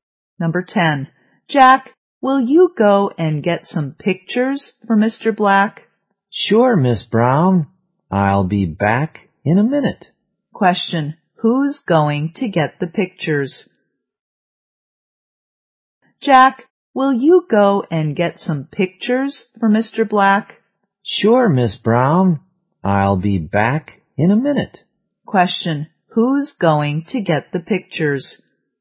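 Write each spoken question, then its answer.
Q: Who's going to get the pictures?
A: Jack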